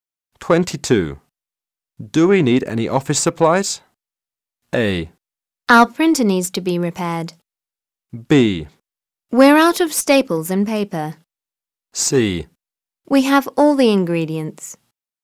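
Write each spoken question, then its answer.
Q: Do we need any office supplies?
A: B: We're out of staples and paper.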